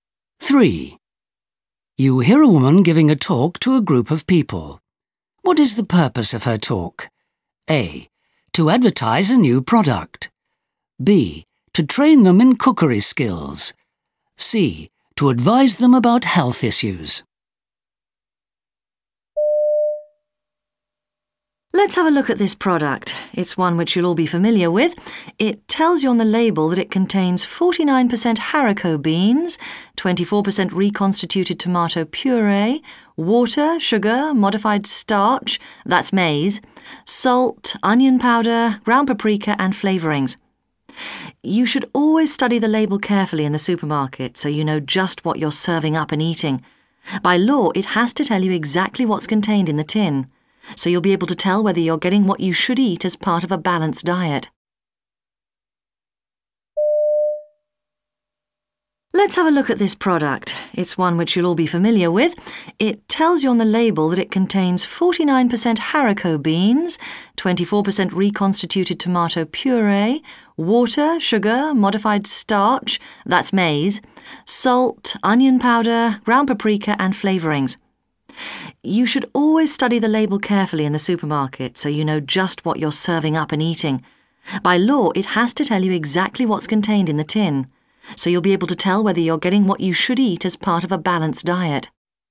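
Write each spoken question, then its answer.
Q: What is the purpose of her talk?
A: C: To advise them about health issues.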